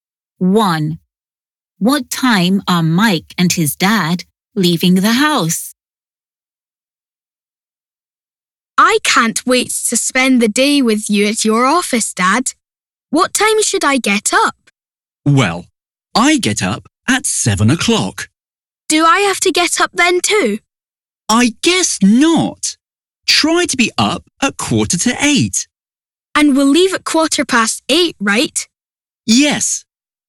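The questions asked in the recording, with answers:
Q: What time are Mike and his dad leaving the house?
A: At 8:15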